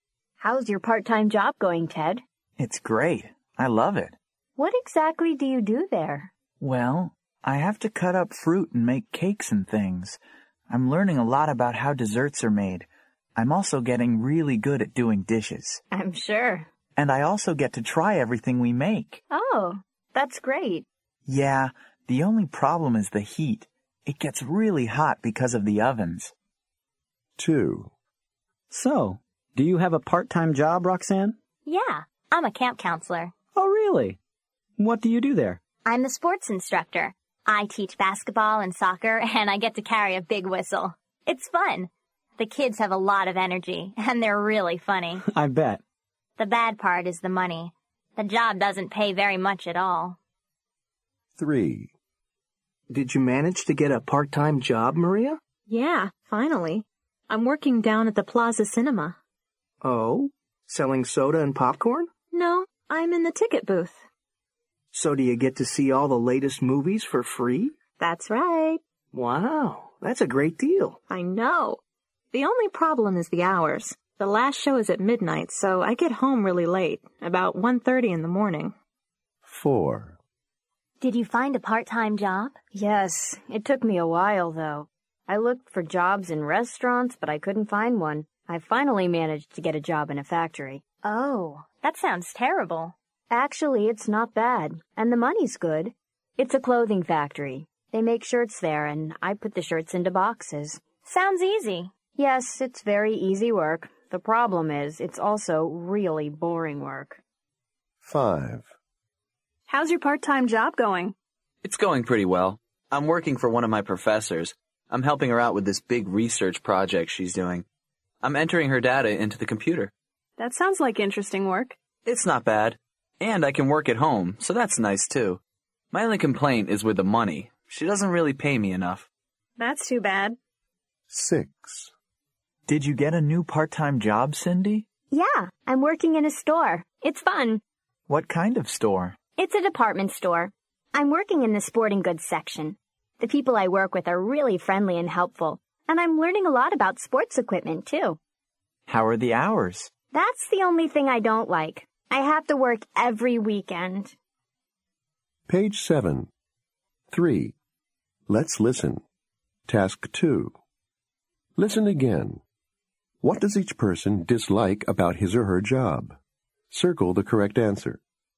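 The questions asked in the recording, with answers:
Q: What does each person dislike about his or her job?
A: The heat

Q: What does each person dislike about his or her job?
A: The money

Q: What does each person dislike about his or her job?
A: The hours

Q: What does each person dislike about his or her job?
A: It's boring

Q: What does each person dislike about his or her job?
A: The money

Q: What does each person dislike about his or her job?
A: Working every weekend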